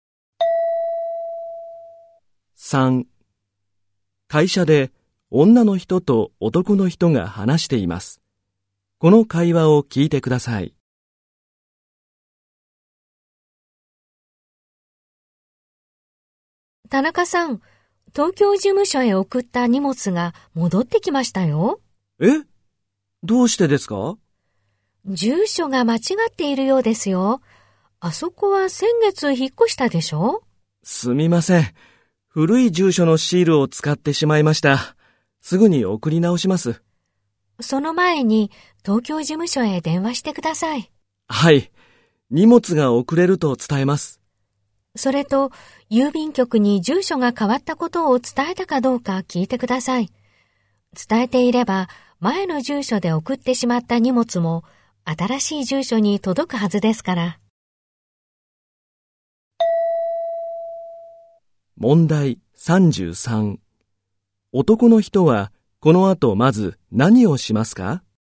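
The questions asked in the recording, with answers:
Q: 男の人はこの後まず何をしますか?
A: 東京事務所へ電話する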